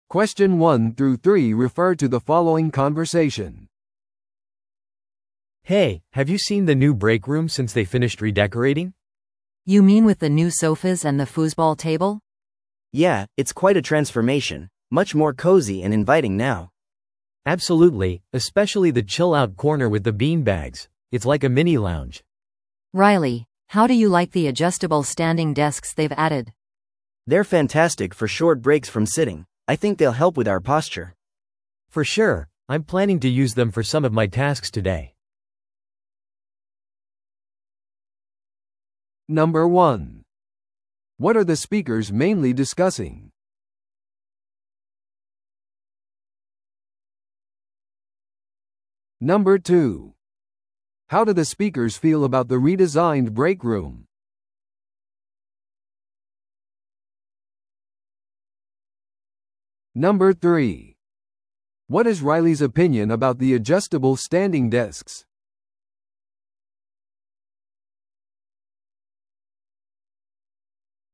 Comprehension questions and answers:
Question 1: What are the speakers mainly discussing?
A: 休憩室の新設備。

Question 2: How do the speakers feel about the redesigned break room?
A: その居心地の良さに感心している。

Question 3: What is Riley's opinion about the adjustable standing desks?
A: 休憩を取るのに役立つと思っている。

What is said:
A: Hey, have you seen the new break room since they finished redecorating?
B: You mean with the new sofas and the foosball table?
C: Yeah, it's quite a transformation. Much more cozy and inviting now.
A: Absolutely, especially the chill-out corner with the bean bags. It's like a mini lounge!
B: Riley, how do you like the adjustable standing desks they've added?
C: They're fantastic for short breaks from sitting. I think they'll help with our posture.
A: For sure! I'm planning to use them for some of my tasks today.